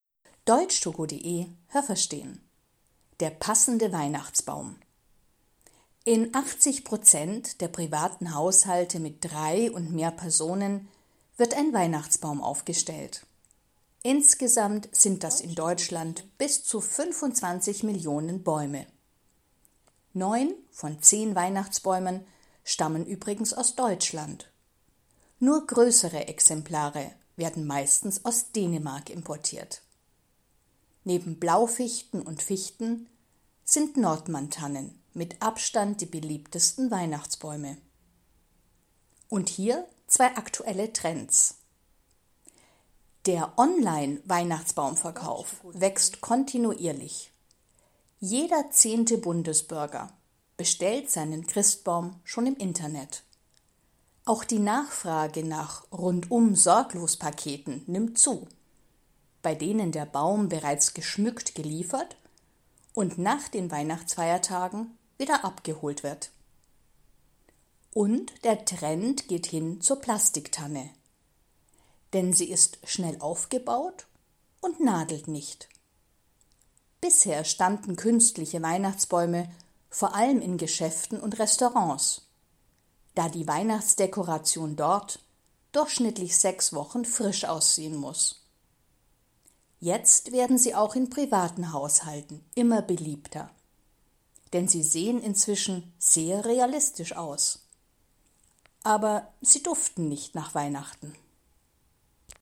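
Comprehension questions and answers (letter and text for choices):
Was haben Sie gehört? Es gibt nur eine korrekte Antwort.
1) In Deutschland ...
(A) stehen in 25 Millionen Haushalten Weihnachtsbäume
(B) werden 25 Millionen Weihnachtsbäume verkauft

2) Die meisten Weihnachtsbäume kommen aus ...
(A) Deutschland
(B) Dänemark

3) _____ ist der beliebteste Weihnachtsbaum.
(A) Die Fichte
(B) Die Nordmanntanne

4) _____ der Bundesbürger bestellen ihren Weihnachtsbaum im Internet.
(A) 10 Prozent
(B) 90 Prozent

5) Im Internet gibt es „Rundum-sorglos-Pakete", das heißt ...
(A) jemand kommt und hilft beim Schmücken des Christbaums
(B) der Christbaum wird bereits dekoriert geliefert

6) Künstliche Weihnachtsbäume standen früher ...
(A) nur in Geschäften und Restaurants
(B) in den meisten Privathaushalten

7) Plastiktannen sind heute beliebter, weil sie ...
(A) realistischer aussehen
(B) nach Weihnachten duften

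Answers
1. (B) werden 25 Millionen Weihnachtsbäume verkauft
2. (A) Deutschland
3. (B) Die Nordmanntanne
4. (A) 10 Prozent
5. (B) der Christbaum wird bereits dekoriert geliefert
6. (A) nur in Geschäften und Restaurants
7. (A) realistischer aussehen

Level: B1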